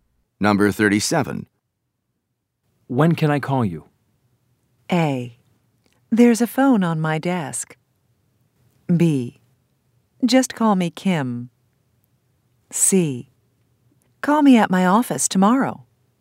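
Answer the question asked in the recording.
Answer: C: Call me at my office tomorrow.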